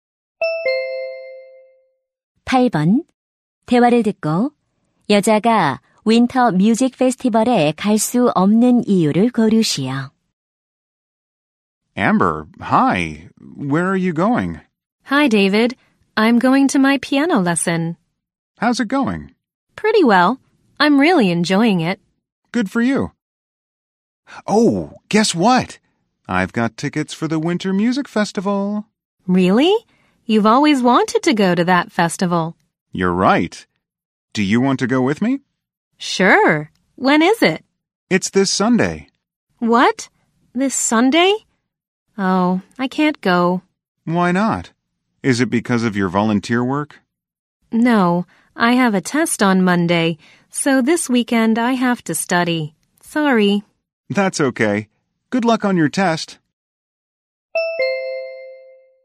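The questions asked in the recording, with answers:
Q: 대화를 듣고 여자가 윈터 뮤직 페스티벌에 갈 수 없는 이유를 고르시오.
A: 월요일 시험 공부를 해야 해서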